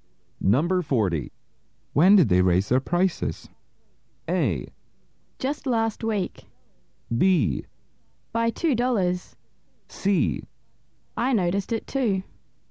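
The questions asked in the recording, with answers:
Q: When did they raise their prices?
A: A: Just last week.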